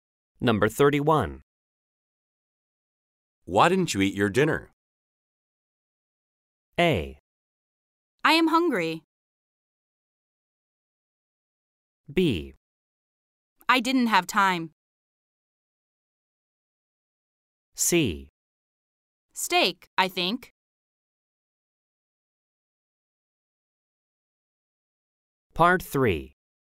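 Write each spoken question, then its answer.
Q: Why didn't you eat your dinner?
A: B: I didn't have time.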